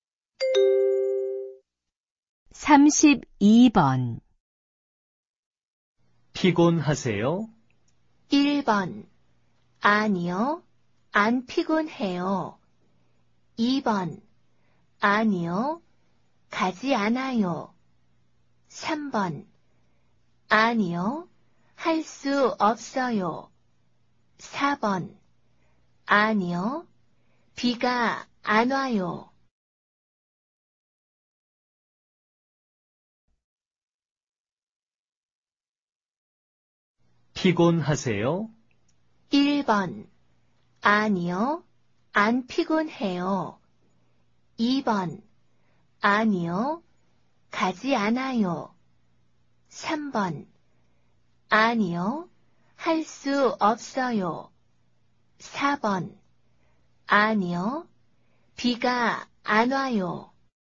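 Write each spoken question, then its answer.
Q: 피곤하세요?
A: 1: 아니요. 안 피곤해요.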